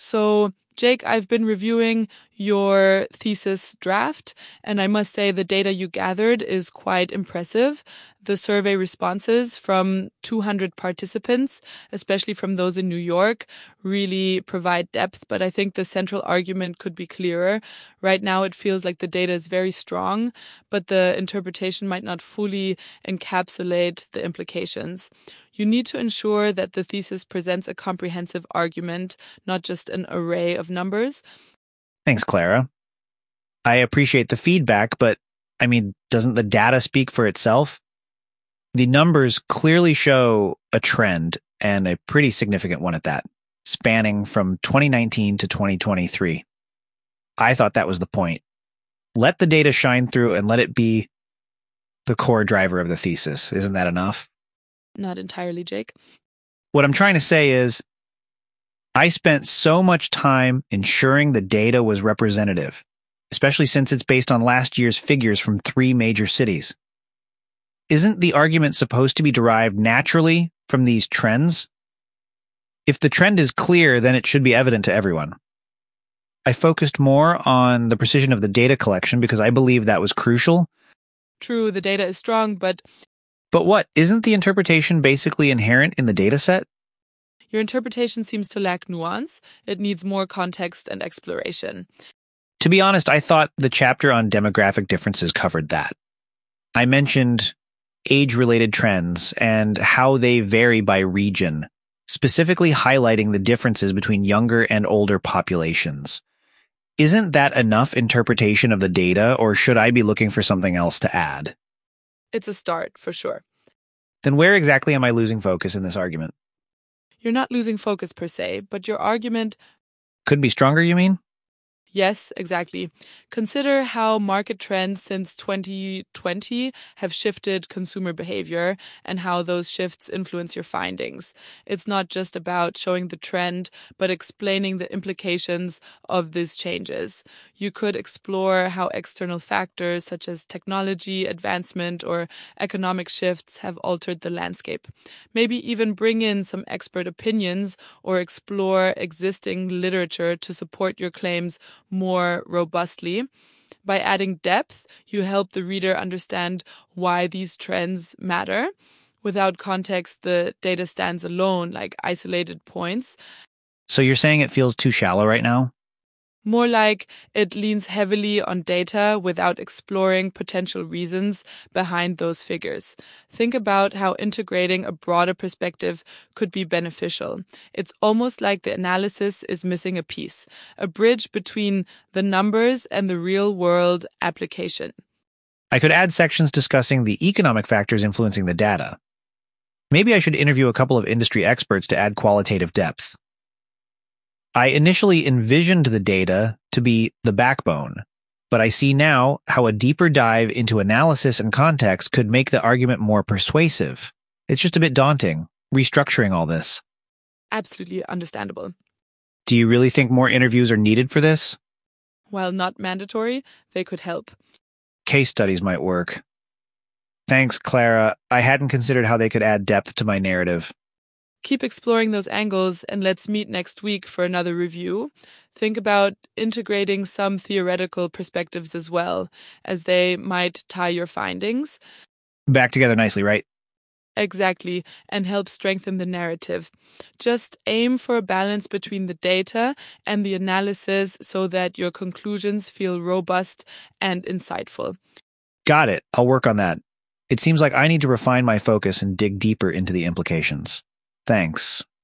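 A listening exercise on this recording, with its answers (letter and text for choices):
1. What is the main concern Clara has about Jake's thesis draft?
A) The data is insufficient for a solid argument.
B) The thesis lacks a clear central argument.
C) The survey responses are not well-organized.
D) The chapter on demographic differences is too detailed.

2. What is Jake's initial attitude towards the feedback on his thesis?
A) He believes the data should stand on its own.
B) He agrees that his interpretation lacks nuance.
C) He appreciates that his data collection is precise.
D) He acknowledges the need for more data.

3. What specific aspect of the thesis does Clara suggest Jake include to strengthen his argument?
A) Further analysis of survey response accuracy.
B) A detailed exploration of the demographic differences.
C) Context on market trends and their implications.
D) More data from additional cities.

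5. What does Clara mean when she says the data 'stands alone, like isolated points'?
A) The data lacks sufficient depth due to improper collection.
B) The data points are not statistically significant.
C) The data is strong but not well integrated into the argument.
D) The data is presented without adequate analytical context.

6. What does Clara suggest as a non-mandatory but beneficial addition to Jake's thesis?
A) Including more data on consumer behavior.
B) Interviewing industry experts.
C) Conducting additional surveys.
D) Adding more statistical charts.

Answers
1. B) The thesis lacks a clear central argument.
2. A) He believes the data should stand on its own.
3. C) Context on market trends and their implications.
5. D) The data is presented without adequate analytical context.
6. B) Interviewing industry experts.

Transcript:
Clara: So, Jake, I've been reviewing your thesis draft, and I must say, the data you gathered is quite impressive. 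The survey responses from 200 participants, especially from those in New York, really provide depth. But I think the central argument could be clearer. Right now, it feels like the data is very strong, but the interpretation might not fully encapsulate the implications. You need to ensure that the thesis presents a comprehensive argument, not just an array of numbers.
Jake: Thanks, Clara. I appreciate the feedback, but, I mean, doesn't the data speak for itself? The numbers clearly show a trend and a pretty significant one at that, spanning from 2019 to 2023. I thought that was the point—let the data shine through and let it be the core driver of the thesis. Isn't that enough?
Clara: Not entirely, Jake.
Jake: What I'm trying to say is, I spent so much time ensuring the data was representative, especially since it's based on last year's figures from three major cities. Isn't the argument supposed to be derived naturally from these trends? 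If the trend is clear, then it should be evident to everyone. I focused more on the precision of the data collection because I believed that was crucial.
Clara: True, the data is strong, but—
Jake: But what? Isn't the interpretation basically inherent in the data set?
Clara: Your interpretation seems to lack nuance. It needs more context and exploration.
Jake: To be honest, I thought the chapter on demographic differences covered that. I mentioned age-related trends and how they vary by region, specifically highlighting the differences between younger and older populations. Isn't that enough interpretation of the data, or should I be looking for something else to add?
Clara: It's a start, for sure.
Jake: Then where exactly am I losing focus in this argument?
Clara: You're not losing focus per se, but your argument—
Jake: Could be stronger, you mean?
Clara: Yes, exactly. Consider how market trends since 2020 have shifted consumer behavior and how those shifts influence your findings. 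It's not just about showing the trend but explaining the implications of these changes. You could explore how external factors, such as technology advancement or economic shifts, have altered the landscape. Maybe even bring in some expert opinions or explore existing literature to support your claims more robustly. By adding depth, you help the reader understand why these trends matter. Without context, the data stands alone, like isolated points.
Jake: So you're saying it feels too shallow right now?
Clara: More like, it leans heavily on data without exploring potential reasons behind those figures. Think about how integrating a broader perspective could be beneficial. It's almost like the analysis is missing a piece, a bridge between the numbers and the real-world application.
Jake: I could add sections discussing the economic factors influencing the data. Maybe I should interview a couple of industry experts to add qualitative depth. 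I initially envisioned the data to be the backbone, but I see now how a deeper dive into analysis and context could make the argument more persuasive. It's just a bit daunting, restructuring all this.
Clara: Absolutely understandable.
Jake: Do you really think more interviews are needed for this?
Clara: While not mandatory, they could help.
Jake: Case studies might work. Thanks, Clara. I hadn't considered how they could add depth to my narrative.
Clara: Keep exploring those angles, and let's meet next week for another review. Think about integrating some theoretical perspectives as well, as they might tie your findings—
Jake: Back together nicely, right?
Clara: Exactly, and help strengthen the narrative. Just aim for a balance between the data and the analysis so that your conclusions feel robust and insightful.
Jake: Got it. I'll work on that.

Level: C1 Advanced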